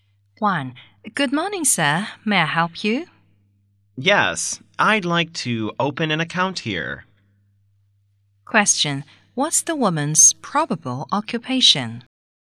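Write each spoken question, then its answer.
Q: What's the woman's probable occupation?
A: A bank clerk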